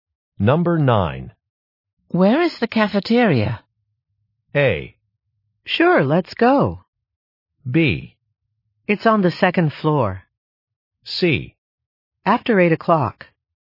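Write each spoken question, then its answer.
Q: Where is the cafeteria?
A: B: It's on the second floor.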